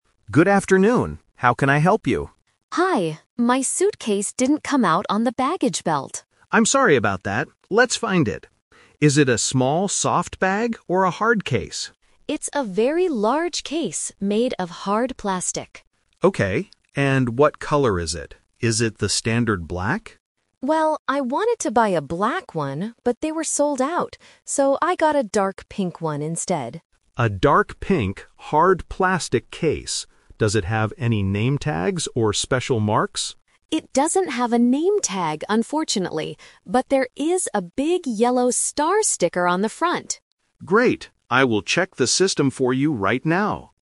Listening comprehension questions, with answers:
Listen to the conversation at the airport and choose the correct answer (A, B, or C).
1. What is the passenger's suitcase made of?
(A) Hard plastic.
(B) Soft fabric.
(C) Light metal.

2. What color is the passenger's suitcase?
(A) Black.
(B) Yellow.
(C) Dark pink.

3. What special mark does the suitcase have?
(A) A name tag.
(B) A yellow star sticker.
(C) A pink ribbon.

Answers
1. A
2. C
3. B

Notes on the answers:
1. The passenger says, "It's a very large case made of hard plastic."
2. The passenger uses the "Twist" here: "So I got a dark pink one instead."
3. The passenger clearly states, "there is a big yellow star sticker on the front."

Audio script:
Staff: Good afternoon. How can I help you?
Passenger: Hi, my suitcase didn't come out on the baggage belt.
Staff: I'm sorry about that. Let's find it. Is it a small soft bag or a hard case?
Passenger: It's a very large case made of hard plastic.
Staff: Okay. And what color is it? Is it the standard black?
Passenger: Well, I wanted to buy a black one, but they were sold out. So I got a dark pink one instead.
Staff: A dark pink, hard plastic case. Does it have any name tags or special marks?
Passenger: It doesn't have a name tag, unfortunately. But there is a big yellow star sticker on the front.

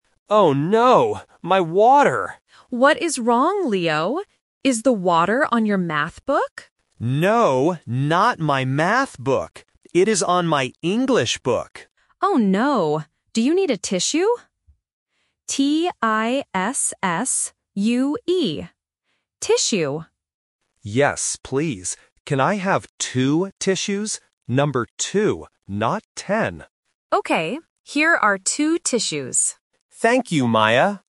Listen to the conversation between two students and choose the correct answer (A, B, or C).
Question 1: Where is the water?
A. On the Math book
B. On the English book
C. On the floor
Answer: B

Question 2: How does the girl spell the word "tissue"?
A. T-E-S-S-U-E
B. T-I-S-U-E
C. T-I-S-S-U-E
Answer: C

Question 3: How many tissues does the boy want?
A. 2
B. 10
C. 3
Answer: A

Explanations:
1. The boy clearly says, "It is on my English book." Option (A) is the trap because the girl asks about the Math book, but the boy says, "No, not my Math book." Option (C) is a plausible place for spilled water but is not mentioned.
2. The girl spells the word very clearly: "T-I-S-S-U-E." Options (A) and (B) are common spelling traps for beginners (E instead of I, or missing an S).
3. The boy asks, "Can I have two tissues?" and repeats "Number two." Option (B) is the trap because he explicitly says "Not ten." Option (C) is not mentioned in the audio.

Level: A1

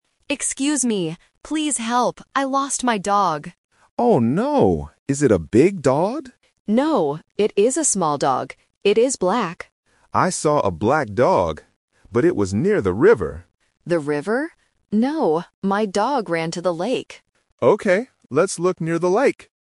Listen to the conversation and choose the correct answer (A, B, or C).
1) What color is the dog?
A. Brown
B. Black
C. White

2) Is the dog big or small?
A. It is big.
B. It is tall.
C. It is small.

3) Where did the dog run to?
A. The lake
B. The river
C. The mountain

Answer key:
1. B
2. C
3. A

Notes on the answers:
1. The owner says the dog is "black". Options (A) and (C) are not mentioned.
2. The owner explicitly says, "No, it is a small dog" after the man asks if it is big. Option (A) is a trap because the word "big" is mentioned in the question, but rejected by the owner.
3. The owner states, "my dog ran to the lake." Option (B) "The river" is a trap because the walker says he saw a dog there, but the owner corrects him. Option (C) is not mentioned.

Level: A1

